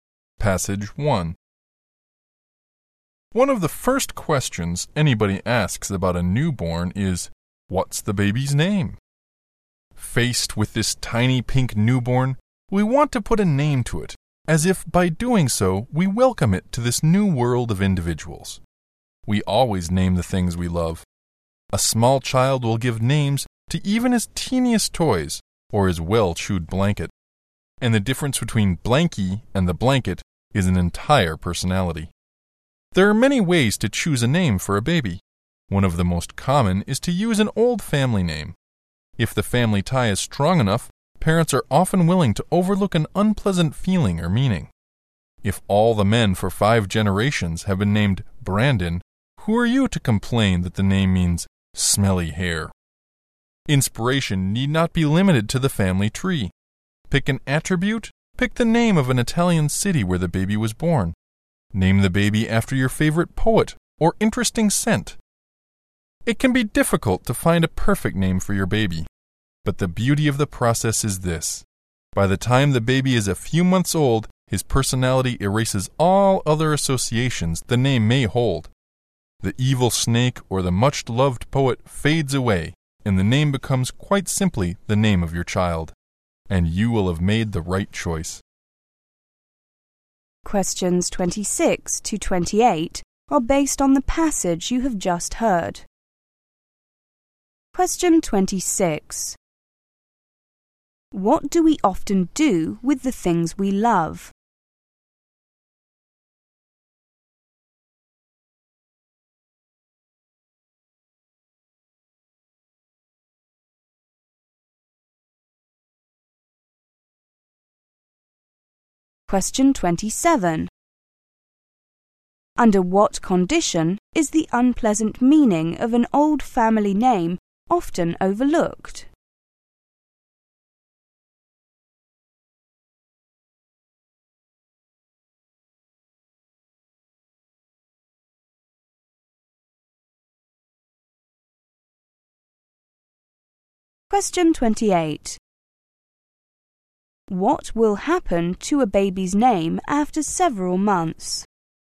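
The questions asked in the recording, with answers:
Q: What do we often do with the things we love?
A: Give them names

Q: Under what condition is the unpleasant meaning of an old family name often overlooked?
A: When the family tie is strong enough

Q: What will happen to a baby's name after several months?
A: It simply becomes the child's name, as his personality erases other associations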